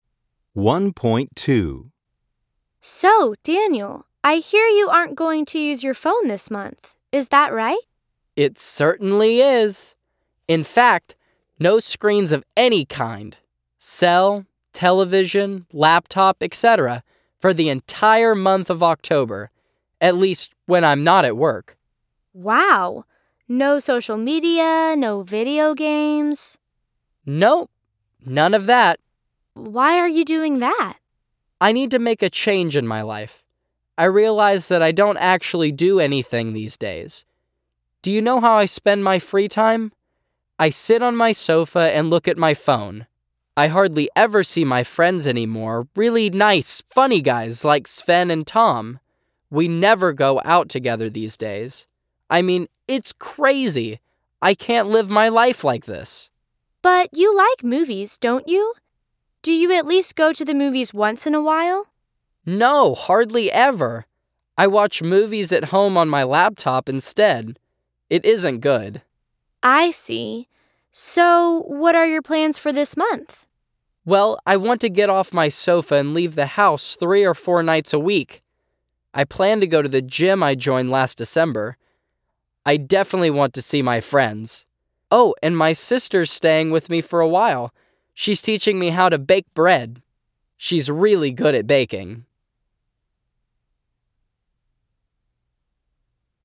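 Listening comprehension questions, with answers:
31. Daniel is not going to use his phone, laptop or watch TV for one month.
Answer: True

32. Daniel doesn't like leaving his house.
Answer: False

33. Daniel often goes to the movies.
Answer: False

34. Daniel wants to start using his gym membership.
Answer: True

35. Daniel's sister is coming and they are going to bake bread together.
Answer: True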